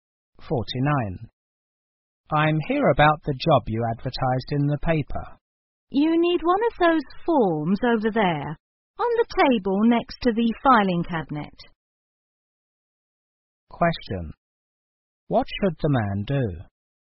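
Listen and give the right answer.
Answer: Get an application form from the table next to the filing cabinet.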